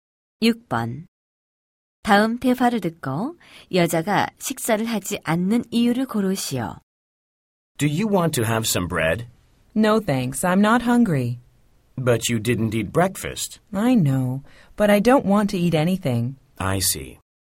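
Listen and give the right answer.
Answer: 배가 고프지 않아서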